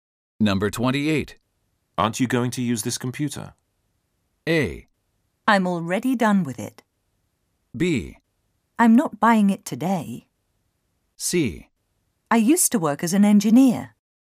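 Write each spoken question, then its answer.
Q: Aren't you going to use this computer?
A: A: I'm already done with it.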